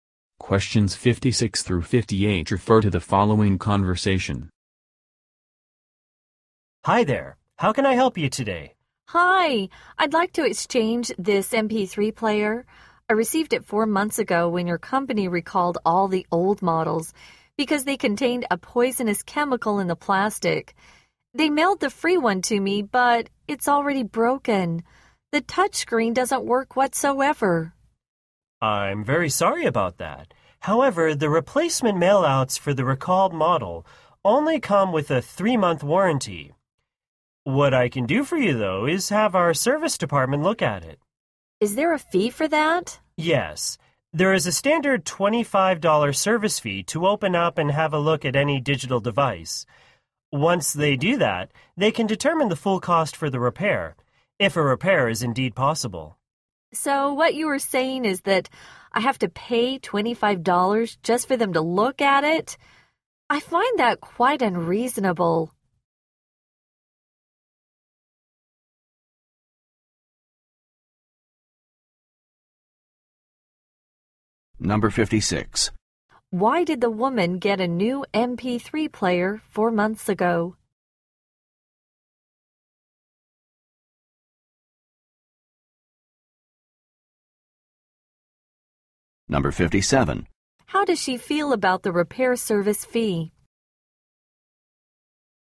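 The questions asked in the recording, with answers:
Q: Why did the woman get a new MP3 player 4 months ago?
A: The old model was recalled for a poisonous chemical

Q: How does she feel about the repair service fee?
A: It is unreasonable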